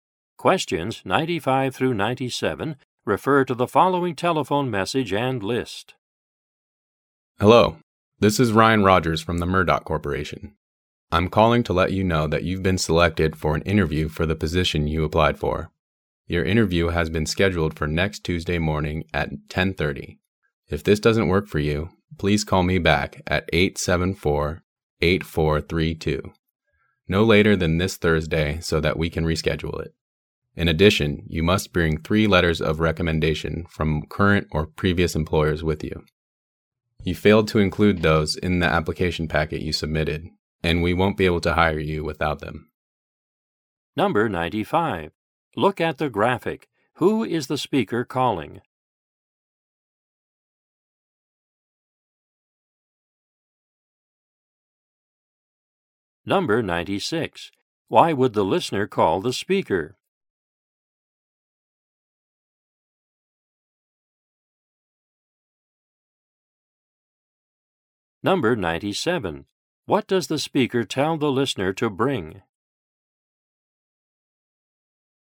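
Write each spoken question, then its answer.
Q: Why would the listener call the speaker?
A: To reschedule the interview

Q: What does the speaker tell the listener to bring?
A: Three letters of recommendation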